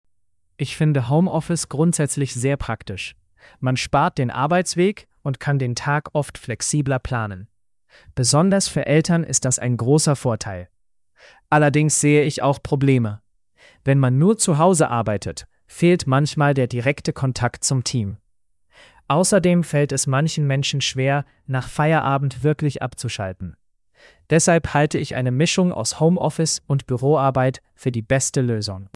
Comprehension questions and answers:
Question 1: Welche Meinung hat die Person?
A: Homeoffice ist praktisch, aber eine Mischung ist besser.

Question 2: Welcher Vorteil wird genannt?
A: Man spart den Arbeitsweg.

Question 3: Welches Problem wird genannt?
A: Der direkte Kontakt zum Team fehlt manchmal.

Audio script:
Ich finde Homeoffice grundsätzlich sehr praktisch. Man spart den Arbeitsweg und kann den Tag oft flexibler planen. Besonders für Eltern ist das ein großer Vorteil. Allerdings sehe ich auch Probleme. Wenn man nur zu Hause arbeitet, fehlt manchmal der direkte Kontakt zum Team. Außerdem fällt es manchen Menschen schwer, nach Feierabend wirklich abzuschalten. Deshalb halte ich eine Mischung aus Homeoffice und Büroarbeit für die beste Lösung.

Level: B2-Niveau